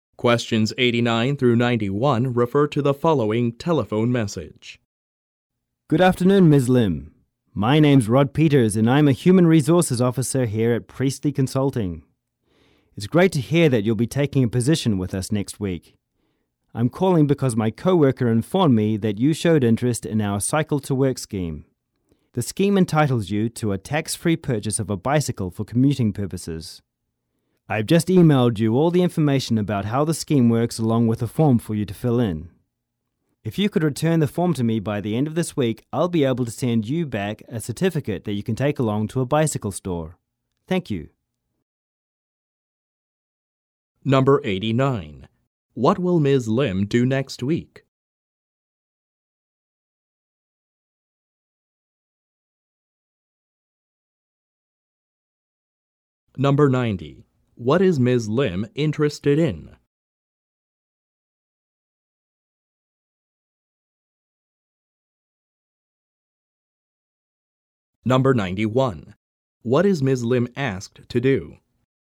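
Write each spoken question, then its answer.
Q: What will Ms. Lim do next week?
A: Start a new job at Priestley Consulting

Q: What is Ms. Lim interested in?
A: The Cycle to Work scheme

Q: What is Ms. Lim asked to do?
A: Return a form by the end of the week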